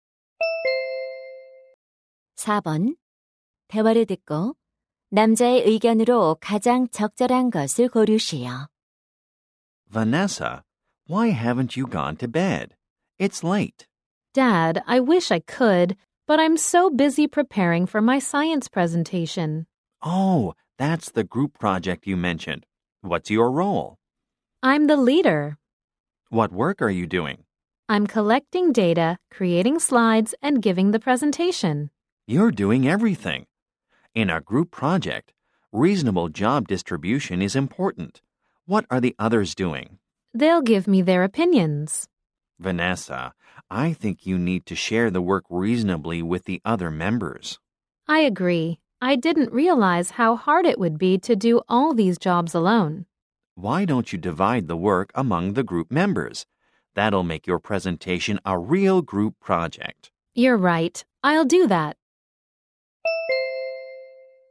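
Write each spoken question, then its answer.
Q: 대화를 듣고 남자의 의견으로 가장 적절한 것을 고르시오.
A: 모둠 과제에서는 구성원 간 합리적인 역할 분담이 중요하다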